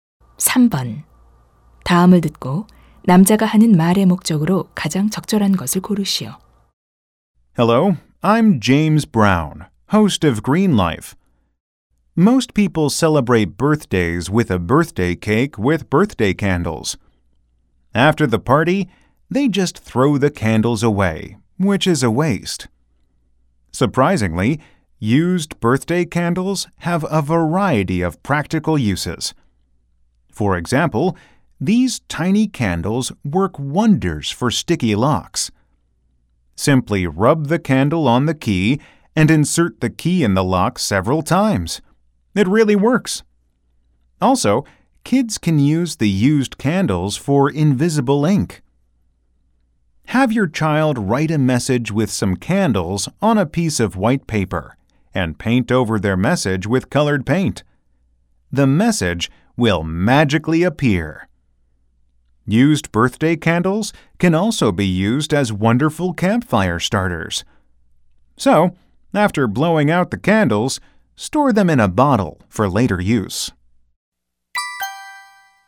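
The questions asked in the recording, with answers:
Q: 다음을 듣고 남자가 하는 말의 목적으로 가장 적절한 것을 고르시오.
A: 다 쓴 생일 초의 다양한 활용법을 소개하려고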